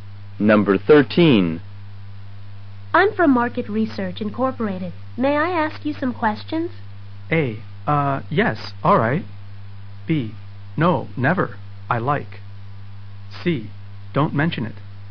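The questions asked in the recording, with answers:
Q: May I ask you some questions?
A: A: Yes, all right.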